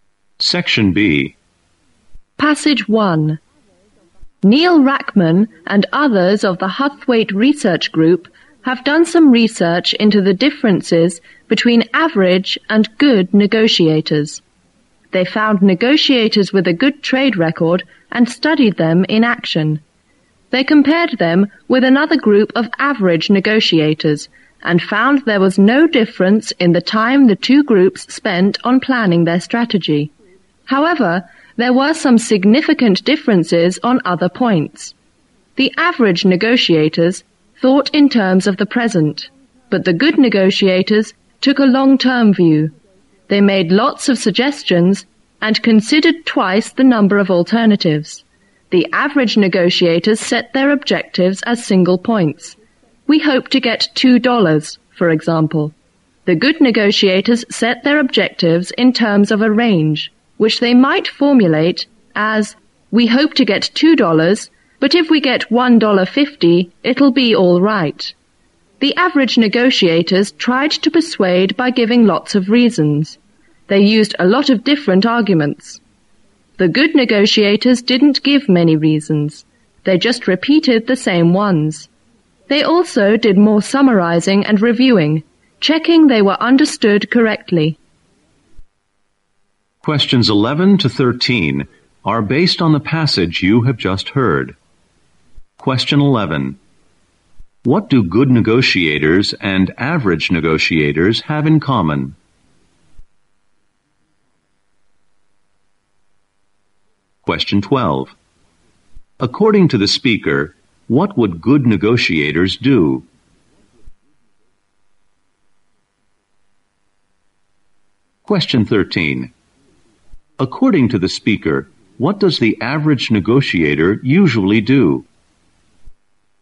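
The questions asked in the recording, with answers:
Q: What do good negotiators and average negotiators have in common?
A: They spend the same time planning their strategy

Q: According to the speaker, what would good negotiators do?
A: Take a long-term view and consider many alternatives

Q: According to the speaker, what does the average negotiator usually do?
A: Give lots of reasons to persuade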